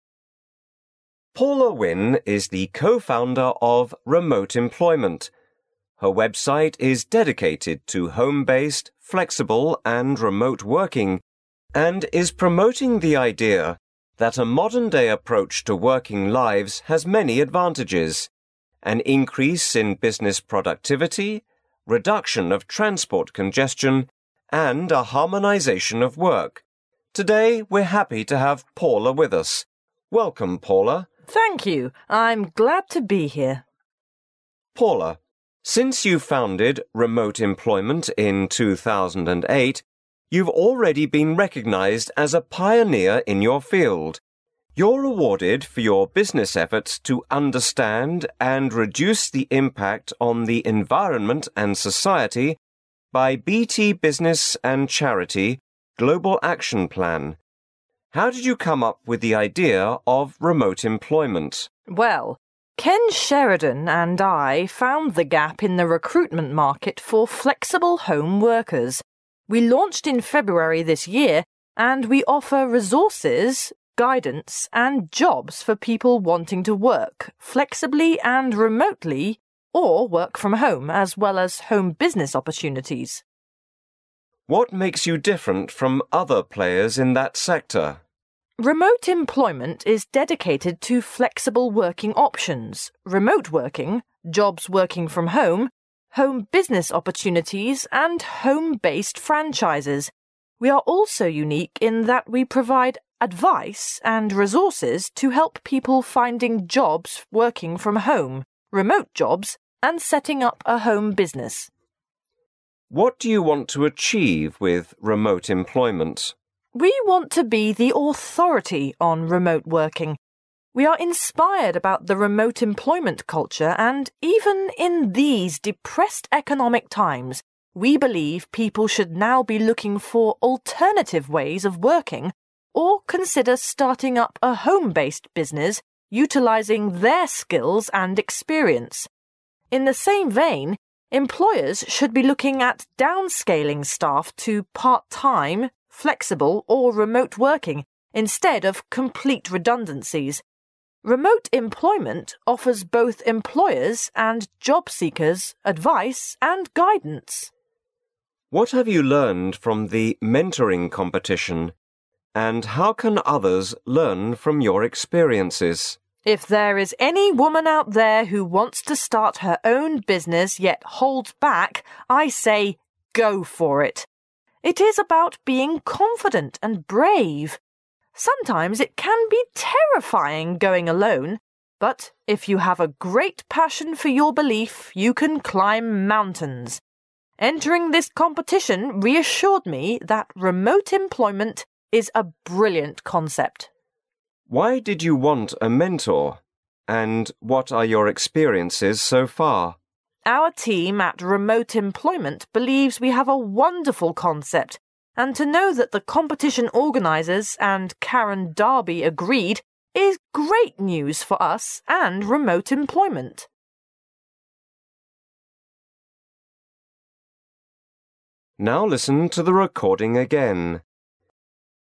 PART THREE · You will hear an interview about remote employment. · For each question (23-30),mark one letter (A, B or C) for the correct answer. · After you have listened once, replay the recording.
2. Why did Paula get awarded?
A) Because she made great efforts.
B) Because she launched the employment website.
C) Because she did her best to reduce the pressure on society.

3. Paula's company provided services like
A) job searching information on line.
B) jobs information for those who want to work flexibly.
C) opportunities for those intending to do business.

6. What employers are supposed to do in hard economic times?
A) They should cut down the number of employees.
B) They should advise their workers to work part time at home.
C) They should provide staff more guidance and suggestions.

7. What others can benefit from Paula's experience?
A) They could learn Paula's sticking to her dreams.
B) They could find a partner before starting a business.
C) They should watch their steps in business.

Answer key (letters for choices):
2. C
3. B
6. B
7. A

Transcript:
[解析] 23-30 Man: Paula Wynne is the co-founder of remote employment. Her website is dedicated to home based, flexible and remote working and is promoting the idea that a modern day approach to working lives has many advantages: an increase in business productivity, reduction of transport congestion and a harmonisation of work. Today we're happy to have Paula with us. Welcome, Paula. Woman: Thank you. I'm glad to be here. Man: Paula, since you've founded Remote Employment in 2008, you've already been recognised as a pioneer in your field. You're awarded for your business efforts to understand and reduce their impact on the environment and society by BT Business and charity Global Action Plan. How did you come up with the idea of Remote Employment? Woman: Well, Ken Sheridan and I found the gap in the recruitment market for flexible home workers. We launched in February this year and we offer resources, guidance and jobs for people wanting to work, flexibly and remotely or work from home, as well as home business opportunities. Man: What makes you different from other players in that sector? Woman: Remote Employment is dedicated to flexible working options, remote working, jobs working from home, home business opportunities and home based franchises. We are also unique in that we provide advice and resources to help people finding jobs working from home, remote jobs and setting up a home business. Man: What do you want to achieve with Remote Employment? Woman: We want to be the authority on remote working. We are inspired about the remote employment culture and even in these depressed economic times we believe people should now be looking for alternative ways of working or consider starting up a home based business utilizing their skills and experience. In the same vein, employers should be looking at downscaling staff to part time, flexible or remote working instead of complete redundancies. Remote Employment offers both employers and job seekers advice and guidance. Man: What have you learned from the mentoring competition and how can others learn from your experiences? Woman: If there is any woman out there who wants to start her own business, yet holds back, I say GO FOR IT! It is about being confident and brave. Sometimes it can be terrifying going alone but if you have a great passion for your belief you can climb mountains. Entering this competition reassured me that Remote Employment is a brilliant concept. Man: Why did you want a mentor and what are your experiences so far? Woman: Our team at Remote Employment believes we have a wonderful concept and to know that the competition organisers and Karen Darby agreed, is great news for us and Remote Employment.